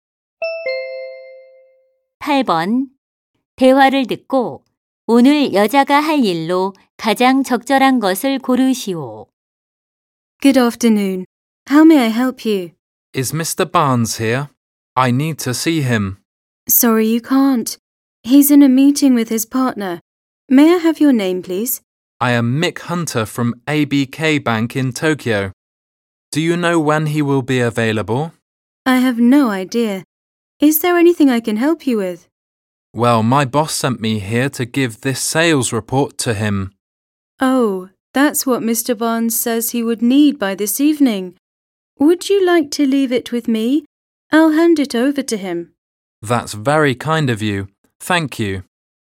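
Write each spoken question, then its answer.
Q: 대화를 듣고 오늘 여자가 할 일로 가장 적절한 것을 고르시오.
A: Barnes 씨에게 판매 보고서 전달하기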